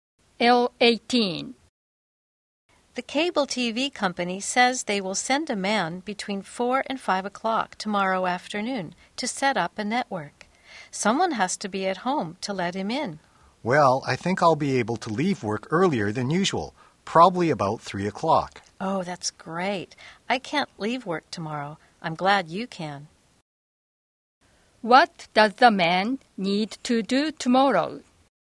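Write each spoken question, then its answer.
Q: What does the man need to do tomorrow?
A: Be at home to let the cable TV technician in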